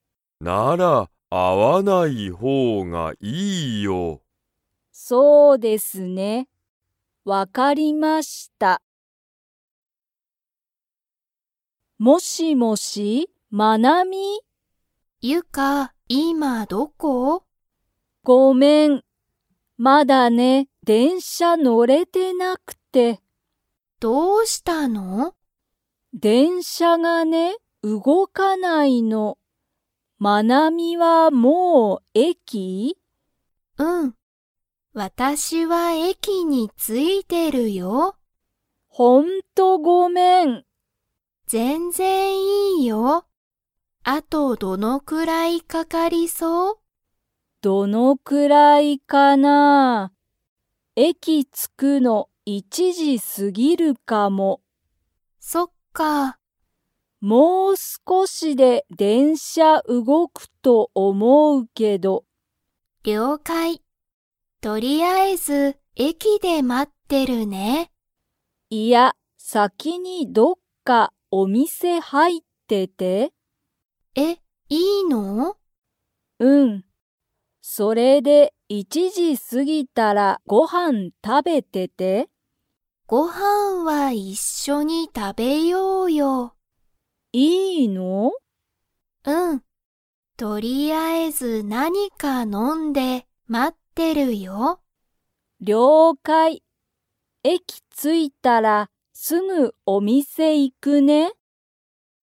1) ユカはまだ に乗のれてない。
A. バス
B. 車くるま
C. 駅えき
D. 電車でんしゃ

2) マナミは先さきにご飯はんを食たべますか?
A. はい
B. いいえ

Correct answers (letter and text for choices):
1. D. 電車でんしゃ
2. B. いいえ

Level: Level 3